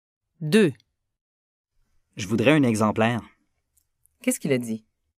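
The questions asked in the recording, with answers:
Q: Qu'est-ce qu'il a dit?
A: Il a dit qu'il voudrait un exemplaire.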